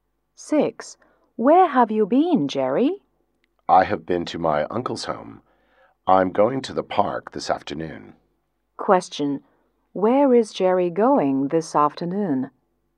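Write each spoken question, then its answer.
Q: Where is Jerry going this afternoon?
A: To the park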